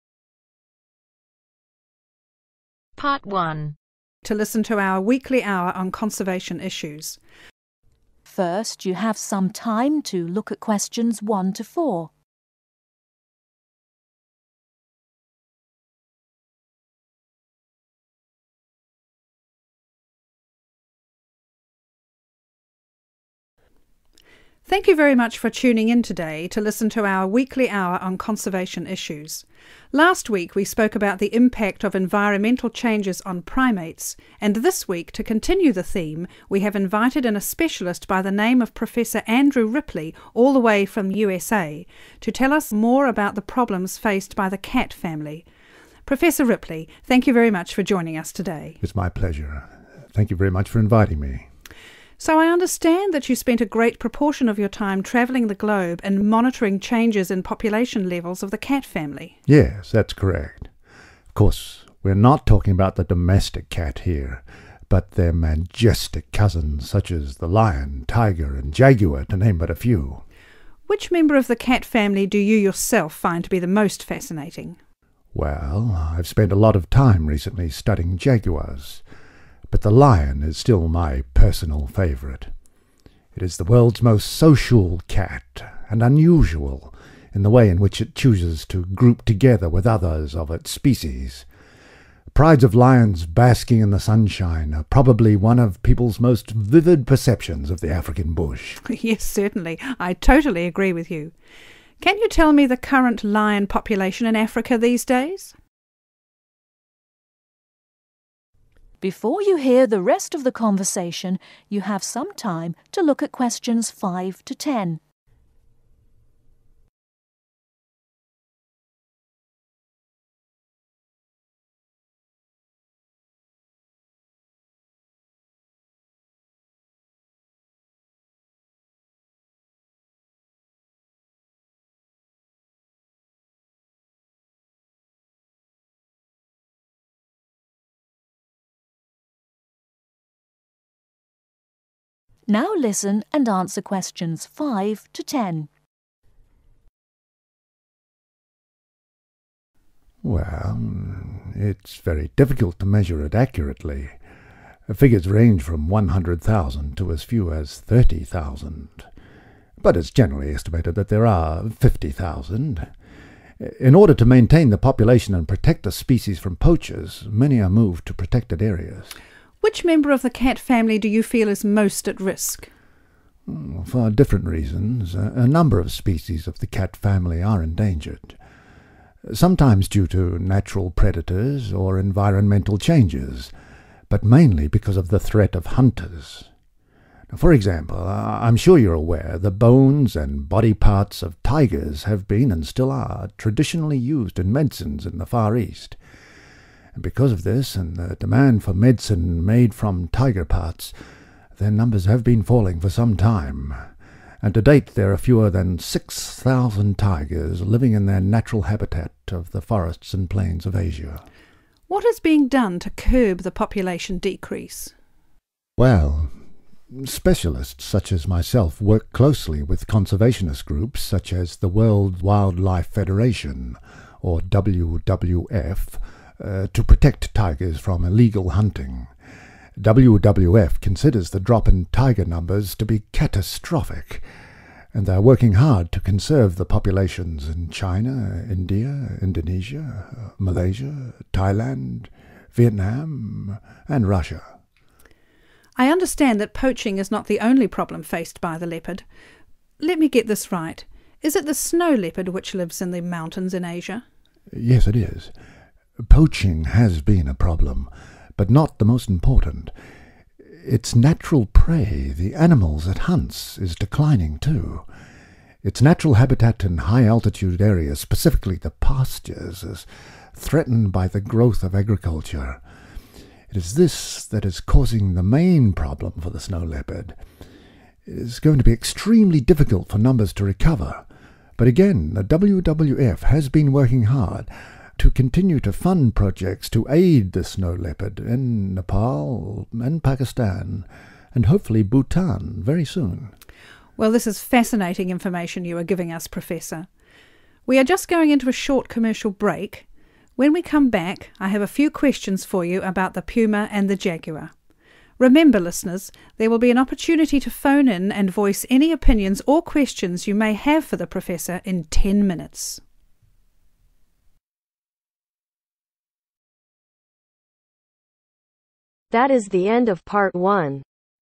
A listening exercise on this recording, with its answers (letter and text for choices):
Answer the following questions USING NO MORE THAN THREE WORDS AND / OR A NUMBER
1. How long is the radio show?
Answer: One hour

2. What is the general focus of the programme?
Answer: Conservation (issues)

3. Where is Professor Ripley from?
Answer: (The) USA

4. According to Professor Ripley, what animals do people most associate with the African bush?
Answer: (Prides of) lions

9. Where is the WWF currently funding projects to help the snow leopard?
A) Nepal, Pakistan and Bhutan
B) Nepal and Pakistan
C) Bhutan and Nepal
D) Pakistan and Bhutan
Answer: B) Nepal and Pakistan

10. Listeners should telephone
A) immediately if they want to put forward an opinion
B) during the commercial break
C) in 10 minutes if they have anything they want to ask the professor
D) if they have any information regarding pumas or jaguars.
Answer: C) in 10 minutes if they have anything they want to ask the professor